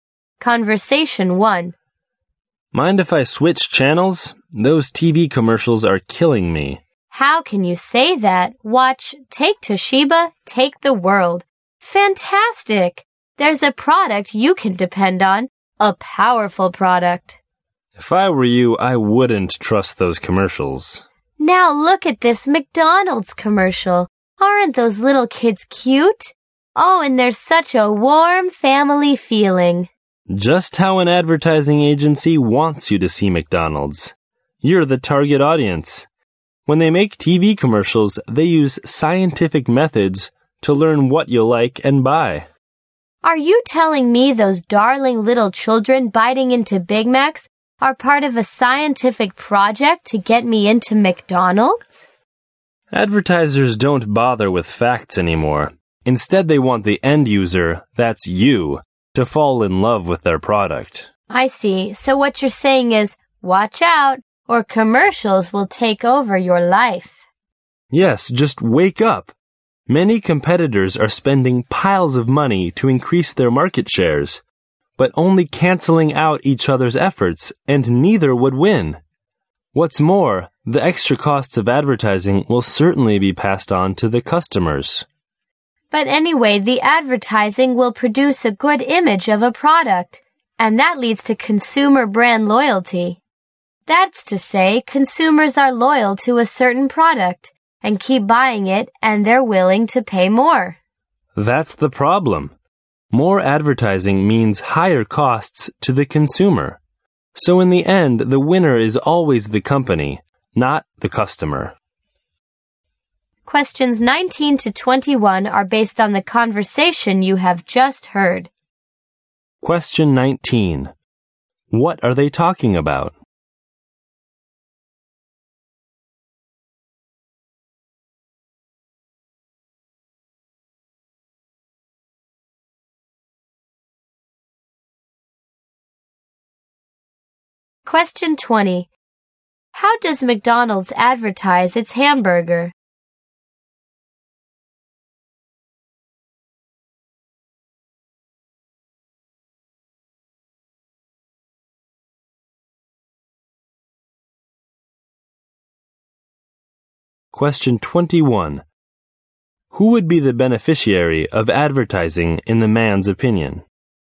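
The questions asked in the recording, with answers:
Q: What are they talking about?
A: TV commercials

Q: How does McDonald's advertise its hamburger?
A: By showing cute kids and a warm family feeling

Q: Who would be the beneficiary of advertising in the man's opinion?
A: The company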